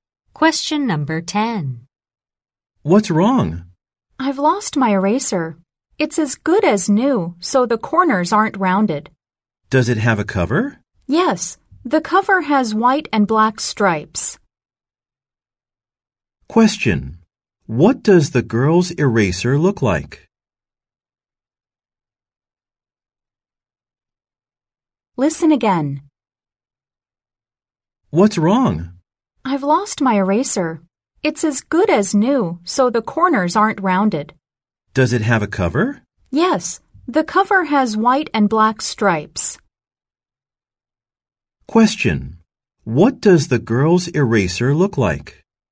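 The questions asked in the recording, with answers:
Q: What does the girl's eraser look like?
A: Almost new with corners that aren't rounded, and a cover with white and black stripes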